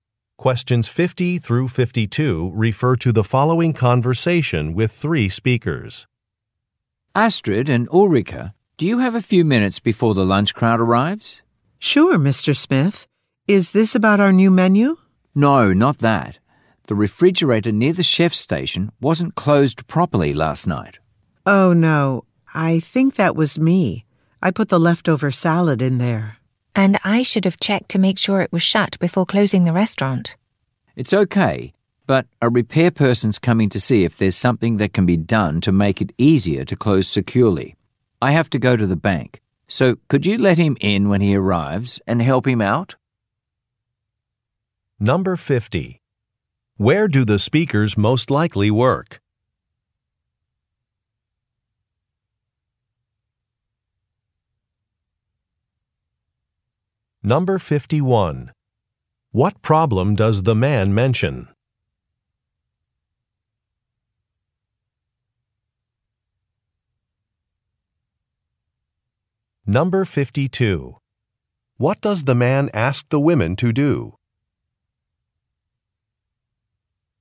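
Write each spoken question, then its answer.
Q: Where do the speakers most likely work?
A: At a restaurant

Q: What problem does the man mention?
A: A refrigerator was not closed properly

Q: What does the man ask the women to do?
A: Let the repair person in and help him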